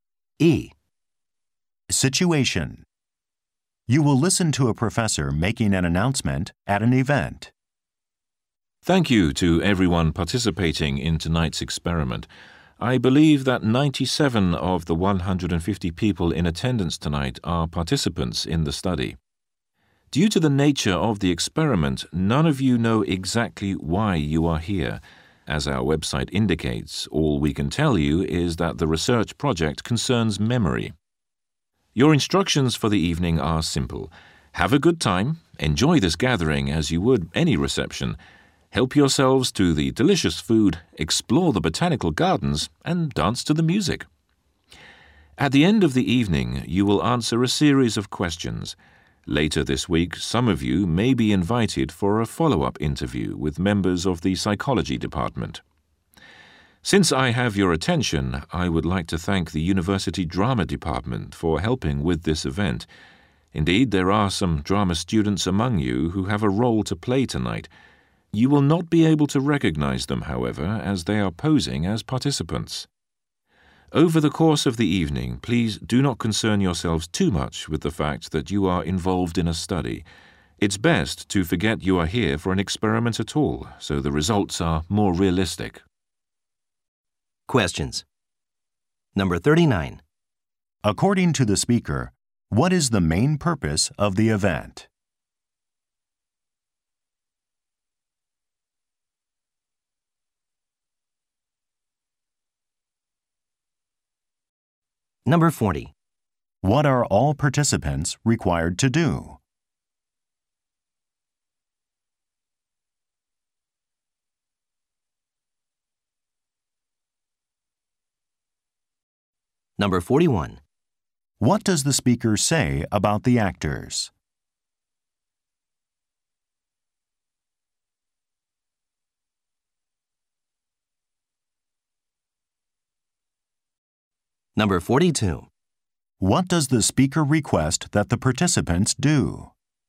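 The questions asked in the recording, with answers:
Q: According to the speaker, what is the main purpose of the event?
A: A research experiment about memory

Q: What are all participants required to do?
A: Answer a series of questions at the end of the evening

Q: What does the speaker say about the actors?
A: They are posing as participants and can't be recognized

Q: What does the speaker request that the participants do?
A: Forget they are in an experiment and enjoy themselves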